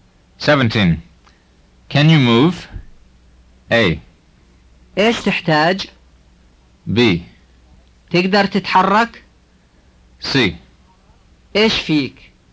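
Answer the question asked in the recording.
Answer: B: تقدر تتحرك؟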